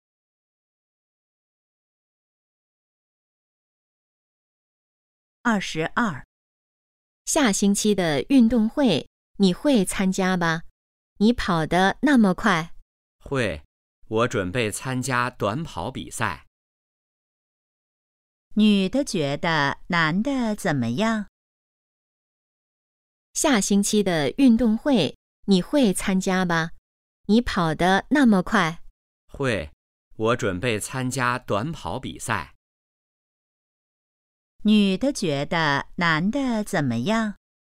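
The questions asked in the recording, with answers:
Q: 女的觉得男的怎么样?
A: 跑得很快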